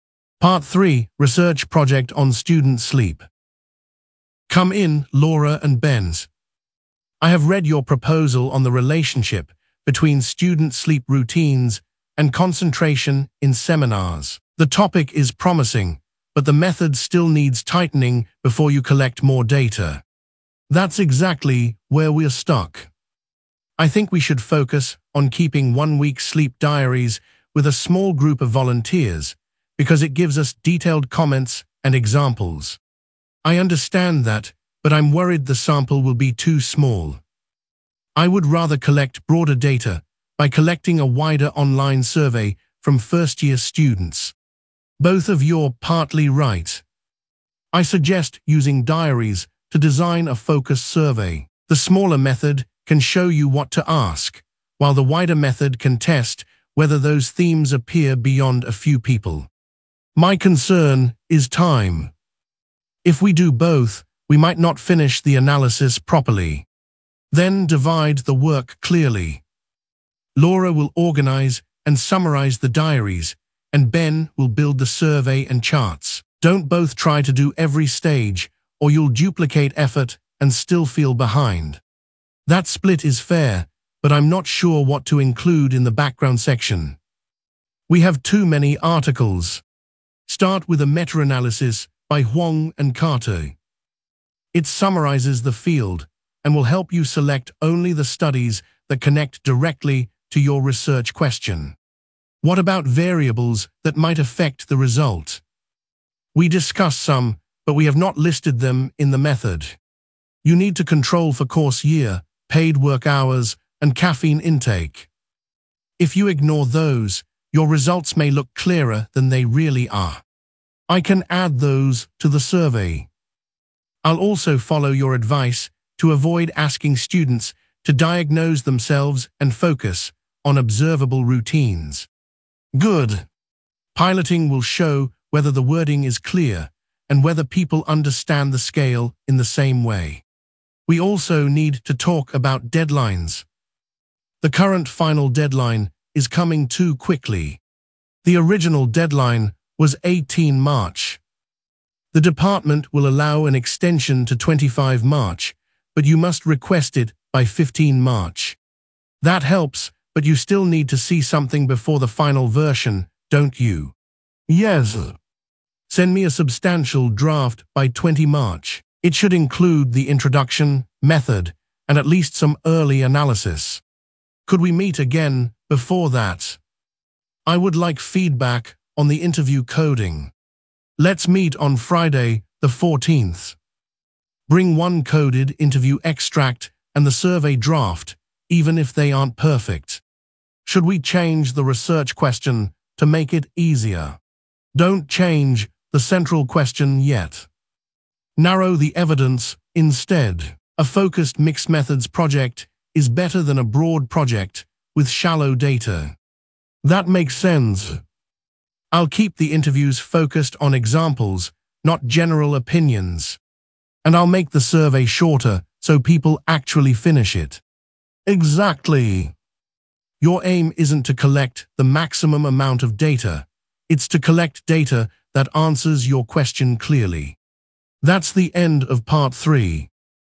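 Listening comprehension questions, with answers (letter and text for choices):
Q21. What is the students' project about?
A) museum opening hours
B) the relationship between student sleep routines and concentration in seminars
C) library seating plans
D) sports team performance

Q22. What method does Laura prefer?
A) collecting a wider online survey from first-year students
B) a laboratory experiment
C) keeping one-week sleep diaries with a small group of volunteers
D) an analysis of newspaper adverts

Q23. What method does Ben prefer?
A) collecting a wider online survey from first-year students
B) keeping one-week sleep diaries with a small group of volunteers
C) a grammar test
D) a map drawing task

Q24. What does the tutor recommend?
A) using interviews only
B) changing the topic completely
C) postponing data collection until next term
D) using diaries to design a focused survey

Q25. 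Which source does the tutor recommend for the background section?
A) an old newspaper column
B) a meta-analysis by Huang and Carter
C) the university prospectus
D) a student blog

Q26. Which controls should the students include?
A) room temperature only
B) the number of library books borrowed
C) course year, paid work hours, and caffeine intake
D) the tutor's timetable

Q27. What will Laura do?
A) Laura will organise and summarise the diaries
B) Ben will build the survey and charts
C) book the lecture theatre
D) write the final conclusion alone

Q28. What is the extended final deadline?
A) 18 March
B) 15 March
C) 20 March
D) 25 March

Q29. When must the students send a substantial draft?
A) Friday the 14th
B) 20 March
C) 15 March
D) 18 March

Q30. What practical advice does the tutor give about the data collection tool?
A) make every question open-ended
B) avoid piloting anything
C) avoid asking students to diagnose themselves and focus on observable routines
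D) collect as much data as possible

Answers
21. B) the relationship between student sleep routines and concentration in seminars
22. C) keeping one-week sleep diaries with a small group of volunteers
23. A) collecting a wider online survey from first-year students
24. D) using diaries to design a focused survey
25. B) a meta-analysis by Huang and Carter
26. C) course year, paid work hours, and caffeine intake
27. A) Laura will organise and summarise the diaries
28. D) 25 March
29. B) 20 March
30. C) avoid asking students to diagnose themselves and focus on observable routines

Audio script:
Part 3: Research Project on Student Sleep
Professor Malik: Come in, Laura and Ben. I have read your proposal on the relationship between student sleep routines and concentration in seminars. The topic is promising, but the method still needs tightening before you collect more data.
Laura: That is exactly where we are stuck. 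I think we should focus on keeping one-week sleep diaries with a small group of volunteers because it gives us detailed comments and examples.
Ben: I understand that, but I am worried the sample will be too small. I would rather collect broader data by collecting a wider online survey from first-year students.
Professor Malik: Both of you are partly right. I suggest using diaries to design a focused survey. The smaller method can show you what to ask, while the wider method can test whether those themes appear beyond a few people.
Laura: My concern is time. If we do both, we might not finish the analysis properly.
Professor Malik: Then divide the work clearly. Laura will organise and summarise the diaries, and Ben will build the survey and charts. Do not both try to do every stage, or you will duplicate effort and still feel behind.
Ben: That split is fair, but I am not sure what to include in the background section. 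We have too many articles.
Professor Malik: Start with a meta-analysis by Huang and Carter. It summarises the field and will help you select only the studies that connect directly to your research question.
Laura: What about variables that might affect the result? We discussed some, but we have not listed them in the method.
Professor Malik: You need to control for course year, paid work hours, and caffeine intake. If you ignore those, your results may look clearer than they really are.
Ben: I can add those to the survey. I will also follow your advice to avoid asking students to diagnose themselves and focus on observable routines.
Professor Malik: Good. Piloting will show whether the wording is clear and whether people understand the scale in the same way.
Laura: We also need to talk about deadlines. The current final deadline is coming too quickly.
Professor Malik: The original deadline was 18 March. 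The department will allow an extension to 25 March, but you must request it by 15 March.
Ben: That helps, but you still need to see something before the final version, don't you?
Professor Malik: Yes. Send me a substantial draft by 20 March. It should include the introduction, method, and at least some early analysis.
Laura: Could we meet again before that? I would like feedback on the interview coding.
Professor Malik: Let's meet on Friday the 14th. Bring one coded interview extract and the survey draft, even if they are not perfect.
Ben: Should we change the research question to make it easier?
Professor Malik: Do not change the central question yet. Narrow the evidence instead. A focused mixed-methods project is better than a broad project with shallow data.
Laura: That makes sense. I will keep the interviews focused on examples, not general opinions.
Ben: And I will make the survey shorter so people actually finish it.
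Professor Malik: Exactly. Your aim is not to collect the maximum amount of data; it is to collect data that answers your question clearly.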